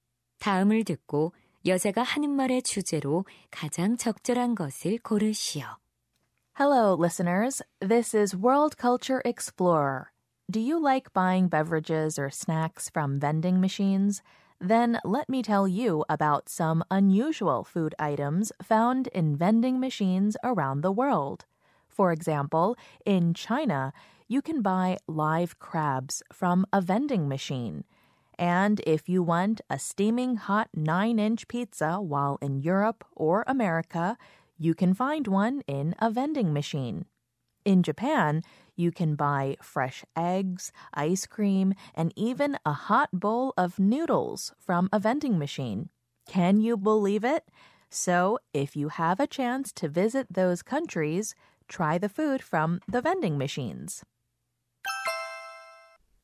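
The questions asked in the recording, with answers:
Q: 다음을 듣고 여자가 하는 말의 주제로 가장 적절한 것을 고르시오.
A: 세계 각국 자판기에서 파는 특이한 음식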